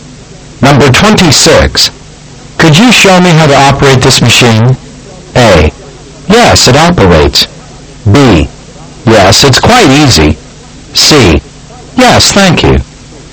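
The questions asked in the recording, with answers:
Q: Could you show me how to operate this machine?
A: B: Yes, it's quite easy.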